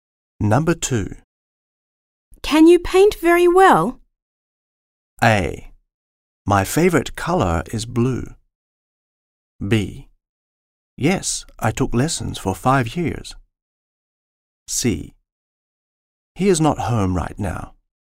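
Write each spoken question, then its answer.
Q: Can you paint very well?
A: B: Yes, I took lessons for 5 years.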